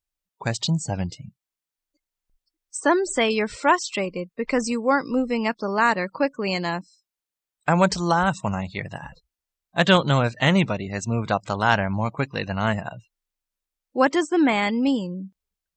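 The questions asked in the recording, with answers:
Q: What does the man mean?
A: He has been promoted faster than anyone else.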